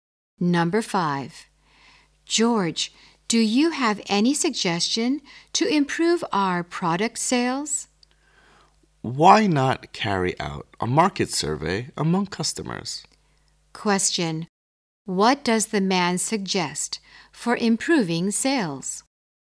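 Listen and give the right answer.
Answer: Carry out a market survey among customers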